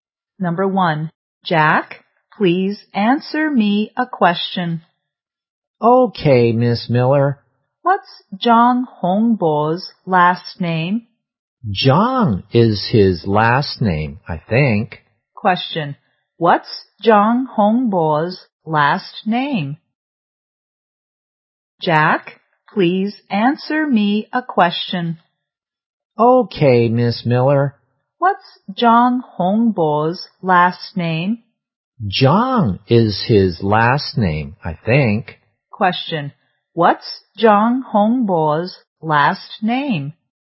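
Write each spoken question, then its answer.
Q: What's John Hongbo's last name?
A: John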